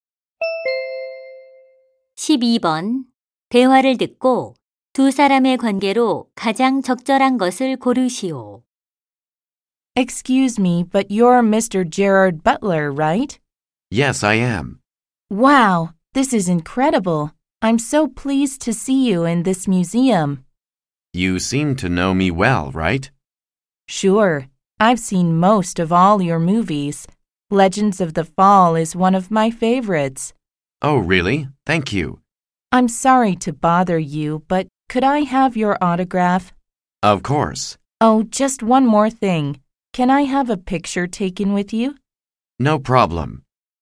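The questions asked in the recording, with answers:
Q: 대화를 듣고 두 사람의 관계로 가장 적절한 것을 고르시오.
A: 영화배우와 팬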